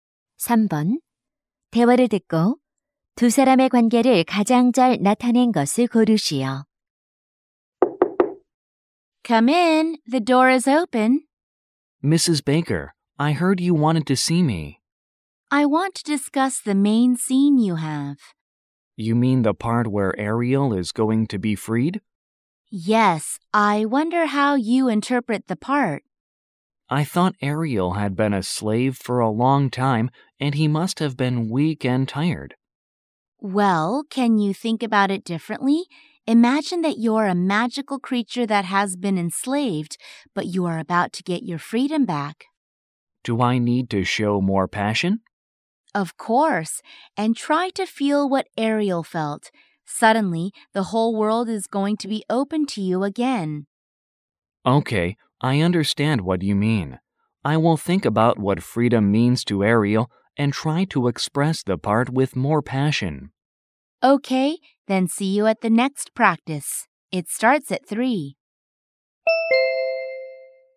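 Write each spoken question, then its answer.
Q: 대화를 듣고 두 사람의 관계를 가장 잘 나타낸 것을 고르시오.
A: 연극 연출가 - 배우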